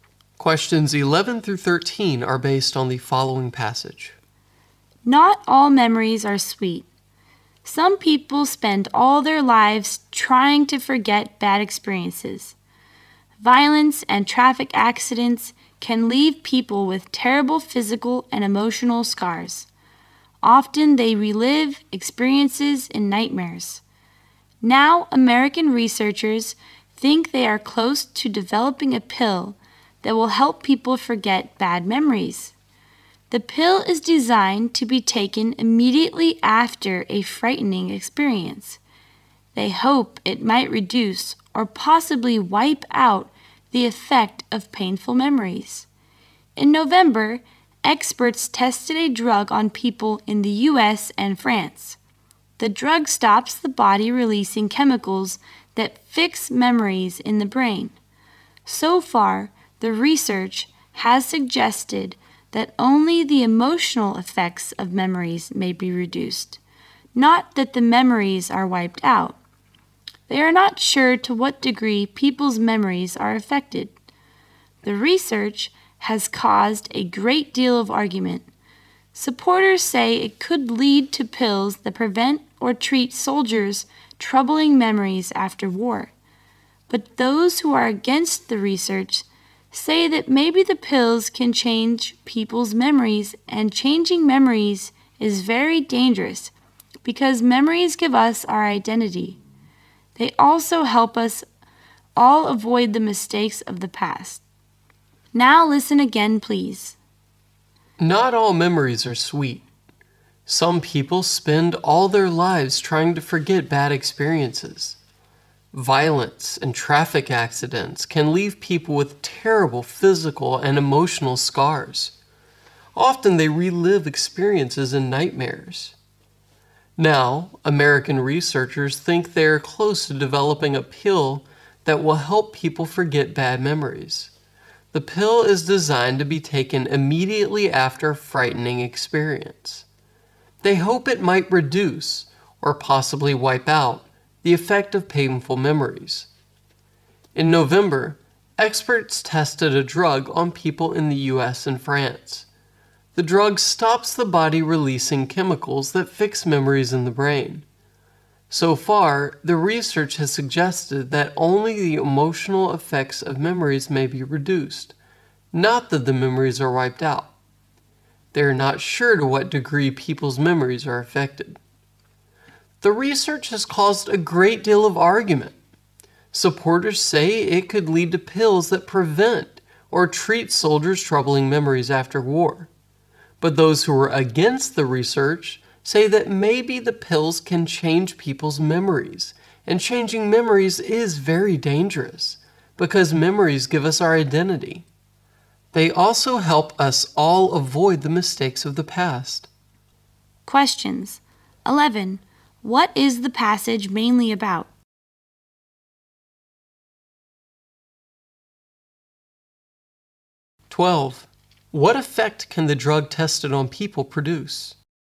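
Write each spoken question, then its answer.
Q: What is the passage mainly about?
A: A pill being developed to help people forget bad memories

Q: What effect can the drug tested on people produce?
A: It may reduce the emotional effects of bad memories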